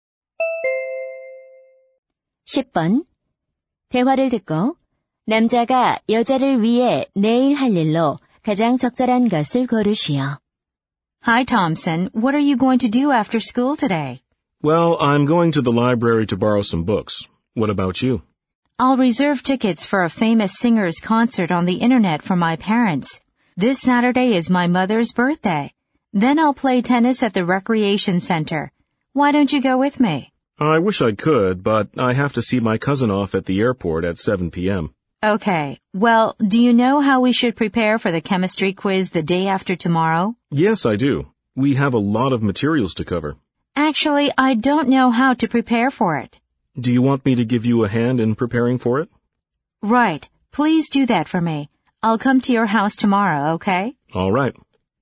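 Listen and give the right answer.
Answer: 화학 퀴즈 준비 도와주기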